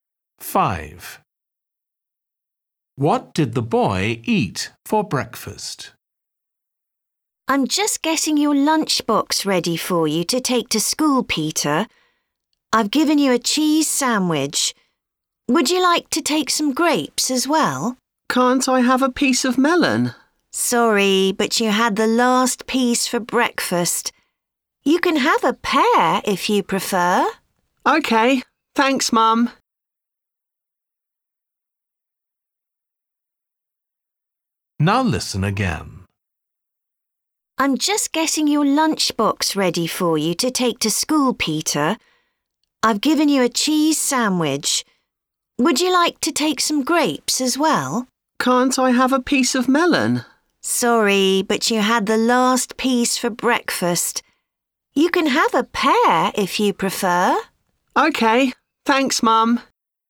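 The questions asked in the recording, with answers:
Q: What did the boy eat for breakfast?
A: Melon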